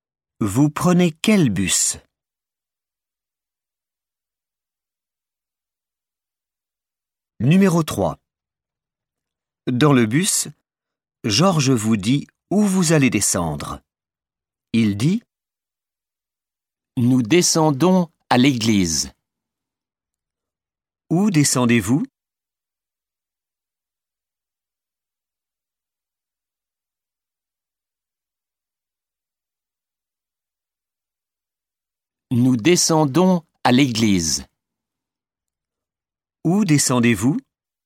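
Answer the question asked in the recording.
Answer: à l'église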